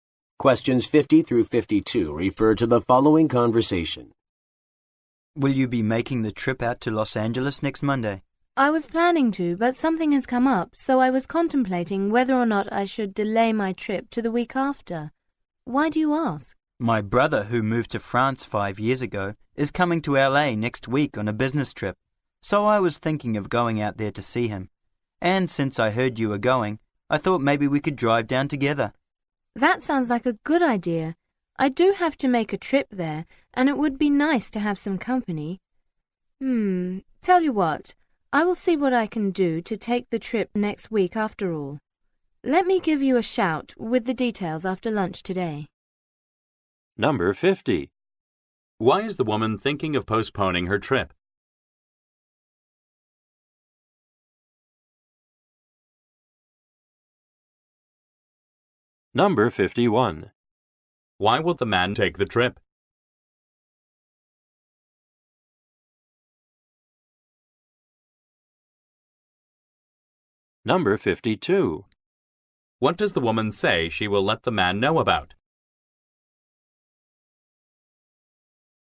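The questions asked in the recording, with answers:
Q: Why is the woman thinking of postponing her trip?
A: Something has come up

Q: Why will the man take the trip?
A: To see his brother, who is visiting LA

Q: What does the woman say she will let the man know about?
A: The details of the trip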